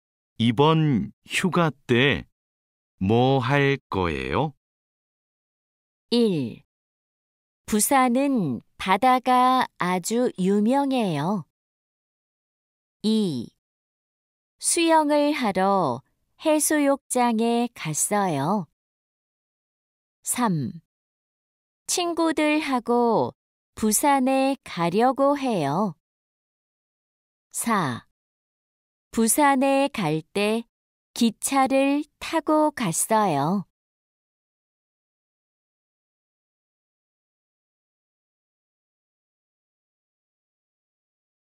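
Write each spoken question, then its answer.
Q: 이번 휴가 때 뭐 할 거예요?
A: 3: 친구들하고 부산에 가려고 해요.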